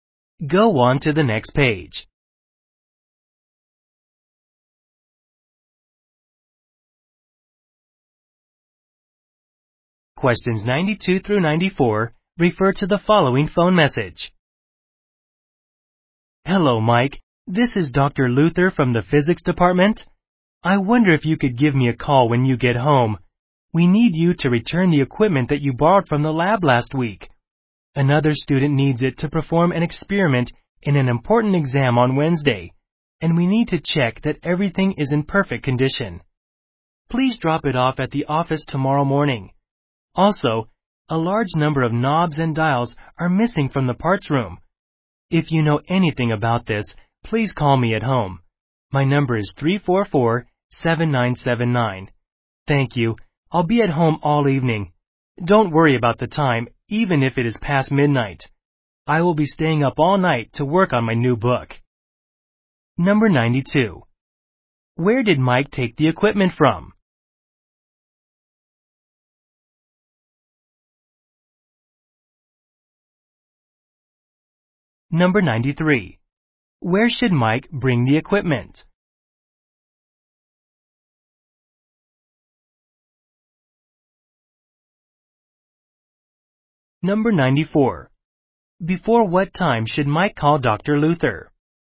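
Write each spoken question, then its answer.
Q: Where did Mike take the equipment from?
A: The lab

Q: Where should Mike bring the equipment?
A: To the office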